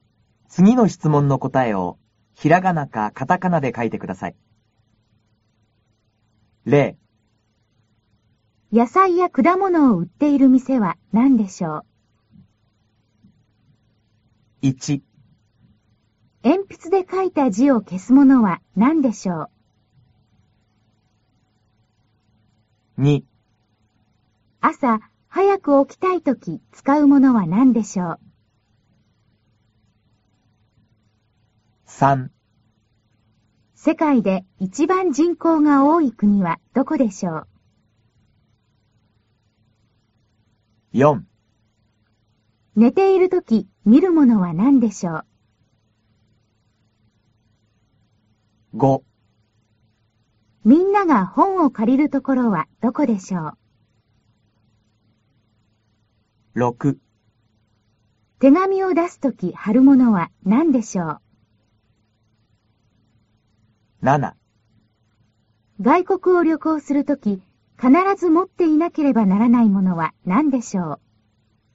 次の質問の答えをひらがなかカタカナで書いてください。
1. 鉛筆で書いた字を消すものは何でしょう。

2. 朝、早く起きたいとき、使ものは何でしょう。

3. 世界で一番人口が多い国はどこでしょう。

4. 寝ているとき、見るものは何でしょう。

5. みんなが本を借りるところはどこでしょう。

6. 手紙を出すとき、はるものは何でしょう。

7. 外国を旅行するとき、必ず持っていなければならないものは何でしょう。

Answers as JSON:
{"1": "けしゴム", "2": "めざましどけい", "3": "ちゅうごく", "4": "ゆめ", "5": "としょかん", "6": "きって", "7": "パスポート"}